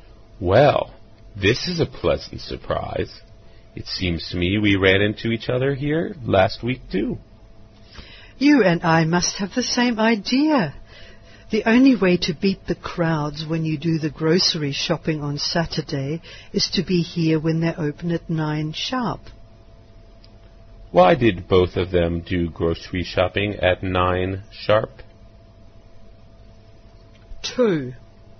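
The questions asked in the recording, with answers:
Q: Why did both of them do grocery shopping at 9 sharp?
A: To beat the Saturday crowds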